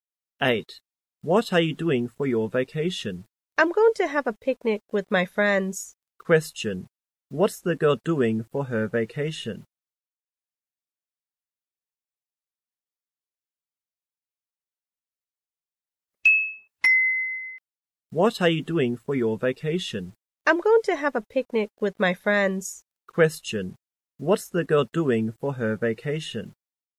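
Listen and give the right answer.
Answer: Having a picnic with her friends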